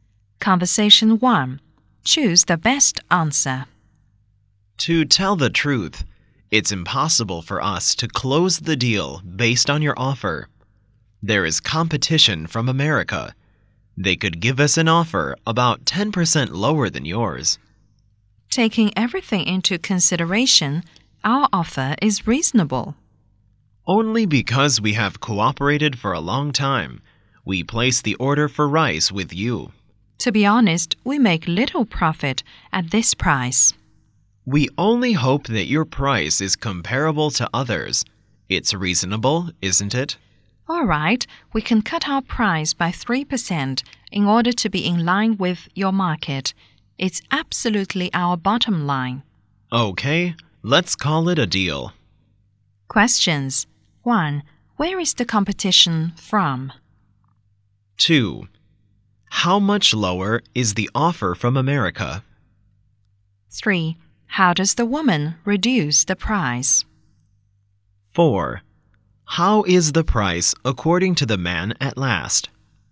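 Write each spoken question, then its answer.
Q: Where is the competition from?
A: America

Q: How much lower is the offer from America?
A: About 10% lower

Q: How does the woman reduce the price?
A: She cuts it by 3%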